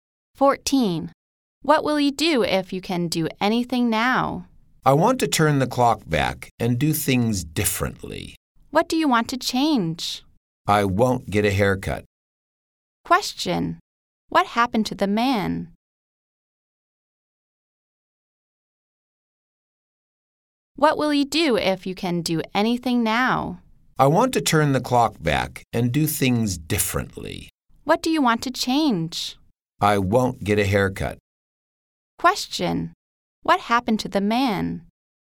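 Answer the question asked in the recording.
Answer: He got a haircut he regrets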